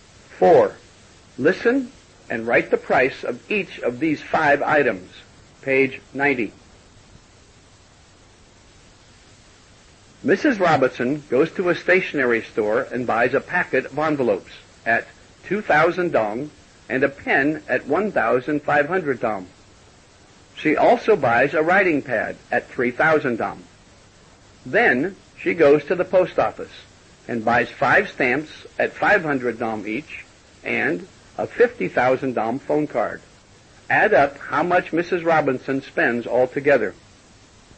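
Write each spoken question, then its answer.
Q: Add up how much Mrs. Robinson spends altogether.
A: 59,000 dong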